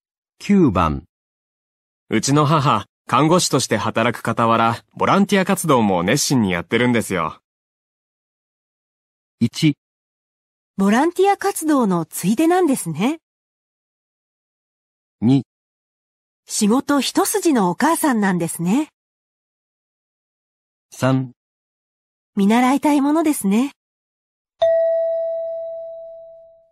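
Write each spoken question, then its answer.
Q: うちの母、看護師として働く傍ら、ボランティア活動も熱心にやってるんですよ。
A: 3: 見習いたいものですね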